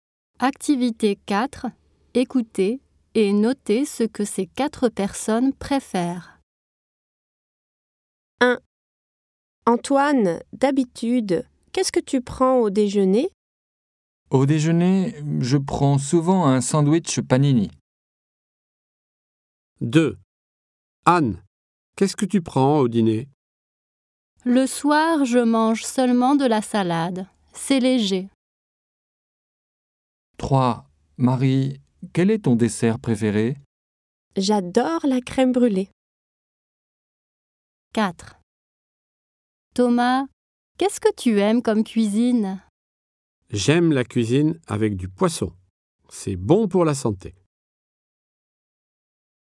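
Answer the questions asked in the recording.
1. un sandwich panini
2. de la salade
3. la crème brûlée
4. la cuisine avec du poisson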